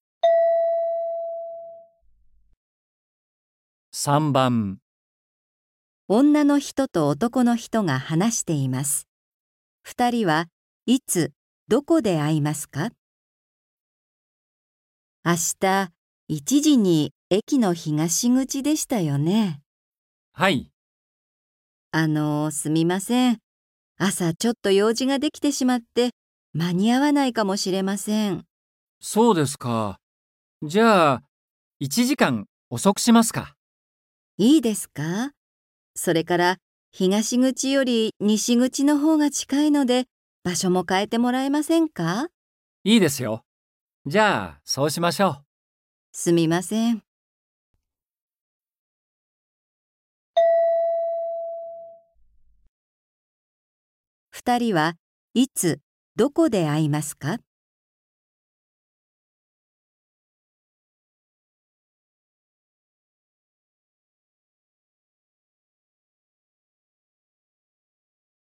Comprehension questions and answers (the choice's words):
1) 二人は、いつ、どこで会いますか。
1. 12時に東口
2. 1時に西口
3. 2時に西口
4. 2時に東口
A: 2時に西口

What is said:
F: いいですか。それから、東口より西口のほうが近いので、場所も変えてもらえませんか。
M: いいですよ。じゃあ、そうしましょう。
F: すみません。

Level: N4